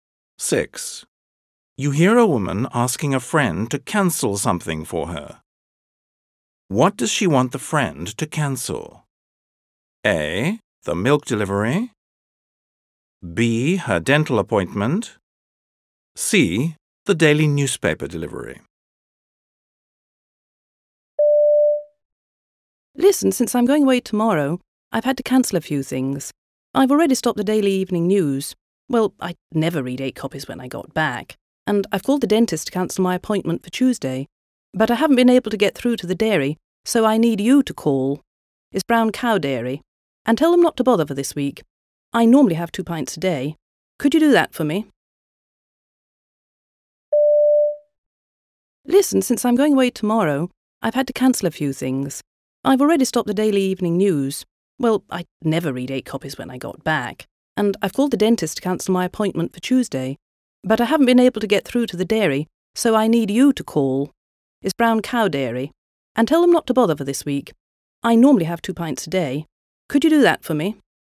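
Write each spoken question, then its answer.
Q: What does she want the friend to cancel?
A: A: The milk delivery.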